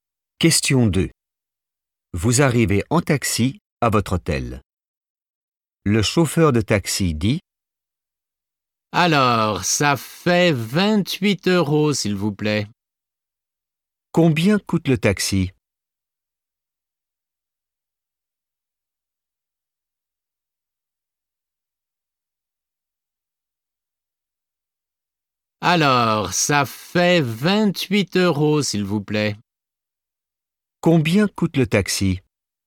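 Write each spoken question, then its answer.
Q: Combien coûte le taxi?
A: 28 euros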